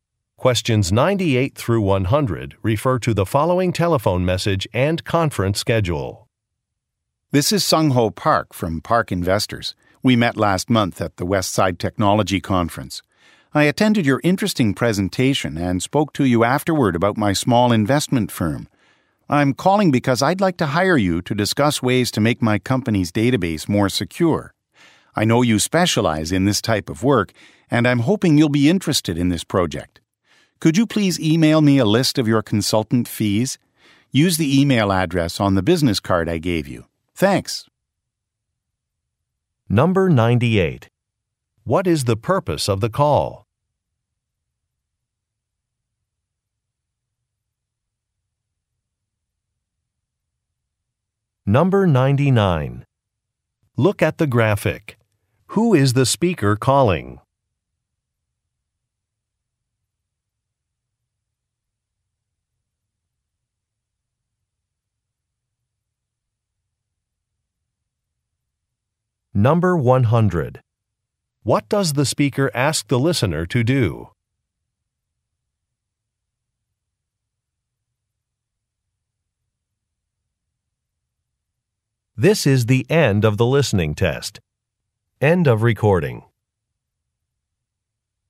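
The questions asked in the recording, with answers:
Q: What is the purpose of the call?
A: To hire the listener to make a database more secure

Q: What does the speaker ask the listener to do?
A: Email a list of consultant fees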